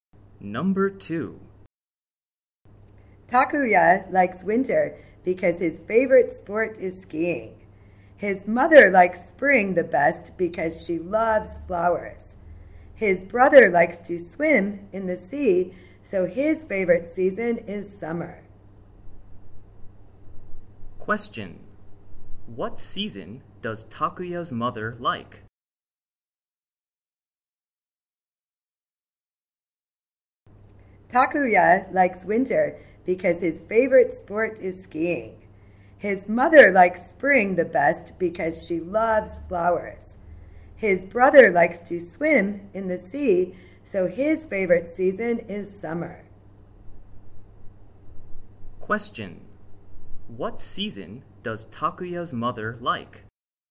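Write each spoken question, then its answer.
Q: What season does Takuya's mother like?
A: Spring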